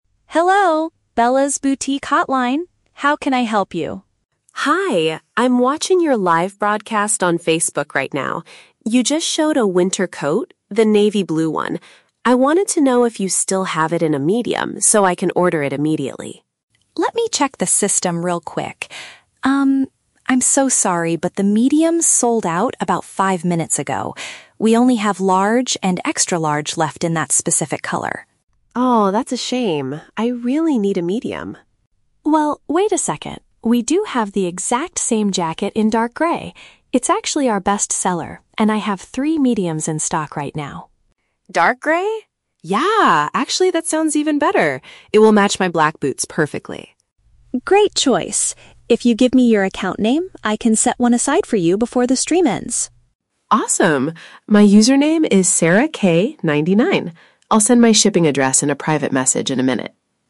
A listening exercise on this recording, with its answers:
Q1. Why is the customer calling the shop?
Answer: To ask about the availability of an item seen on a video feed.

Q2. What is the problem with the navy blue coat?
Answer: It is currently out of stock in the customer's size.

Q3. What does the shop owner ask the customer to provide to reserve the item?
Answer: Her social media profile name.

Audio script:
Shop Owner: Hello, Bella's Boutique hotline. How can I help you?
Customer: Hi, I'm watching your live broadcast on Facebook right now. You just showed a winter coat, the navy blue one. I wanted to know if you still have it in a medium so I can order it immediately.
Shop Owner: Let me check the system real quick. I'm so sorry, but the medium sold out about five minutes ago. We only have large and extra-large left in that specific color.
Customer: Oh, that's a shame. I really need a medium.
Shop Owner: Well, wait a second. We do have the exact same jacket in dark grey. It's actually our best-seller and I have three mediums in stock right now.
Yeah, actually that sounds even better. It will match my black boots perfectly.
Shop Owner: Great choice! If you give me your account name, I can set one aside for you before the stream ends.
Customer: Awesome. My username is SarahK99. I'll send my shipping address in a private message in a minute.